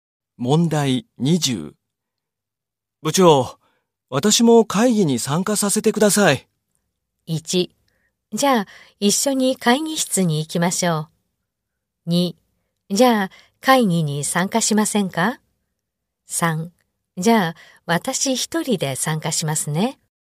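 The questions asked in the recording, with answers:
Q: 部長、私も会議に参加させてください。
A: 1: じゃあ一緒に会議室に行きましょう。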